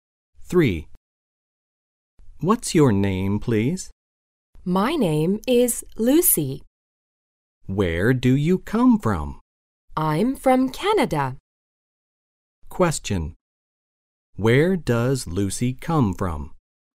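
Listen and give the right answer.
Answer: Canada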